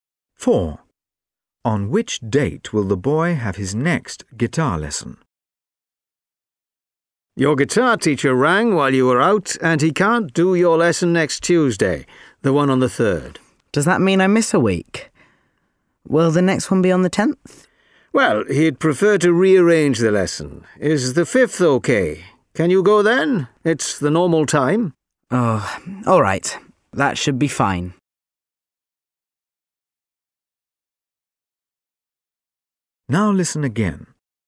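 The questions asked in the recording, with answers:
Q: On which date will the boy have his next guitar lesson?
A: The 5th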